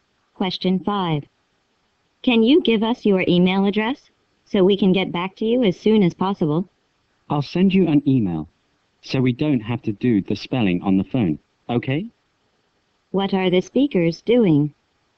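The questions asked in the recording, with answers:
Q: What are the speakers doing?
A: Talking on the phone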